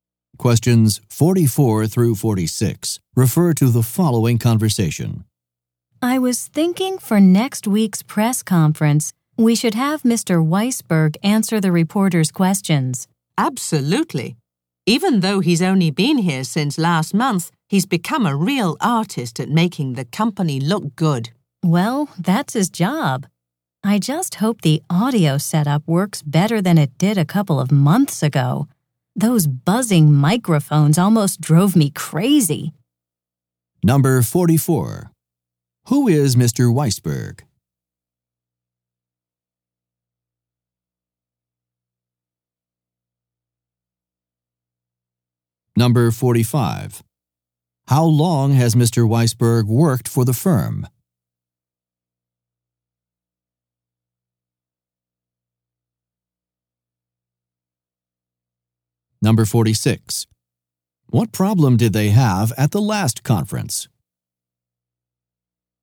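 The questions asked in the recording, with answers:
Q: How long has Mr.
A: About a month

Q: What problem did they have at the last conference?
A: The microphones were buzzing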